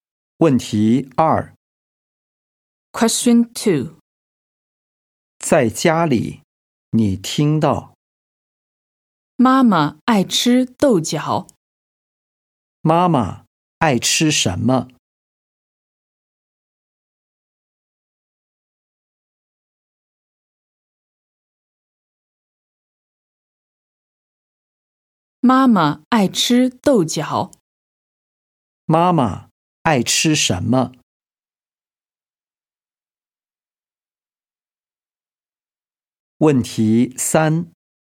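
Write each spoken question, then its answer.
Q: 妈妈爱吃什么?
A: 豆角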